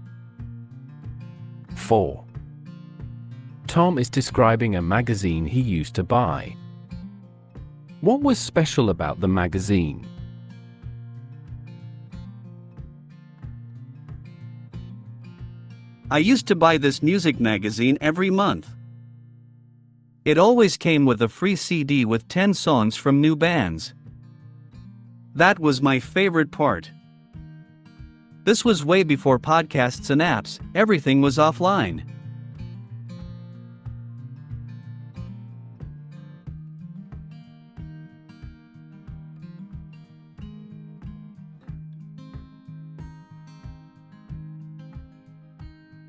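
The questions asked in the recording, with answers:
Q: What was special about the magazine?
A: it came with a free CD of songs from new bands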